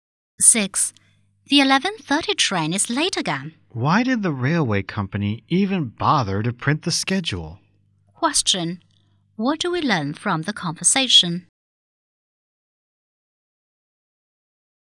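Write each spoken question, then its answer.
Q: What do we learn from the conversation?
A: The train is often late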